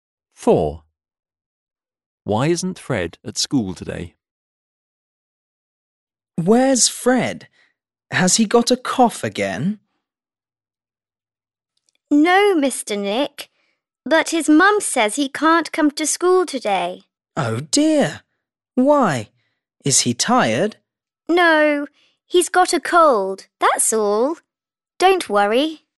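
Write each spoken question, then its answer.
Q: Why isn't Fred at school today?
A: He's got a cold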